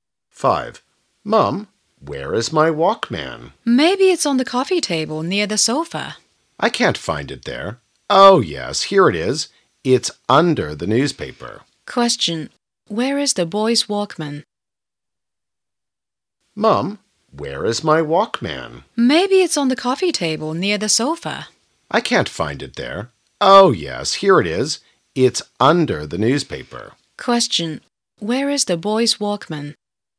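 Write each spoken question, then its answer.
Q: Where is the boy's Walkman?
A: Under the newspaper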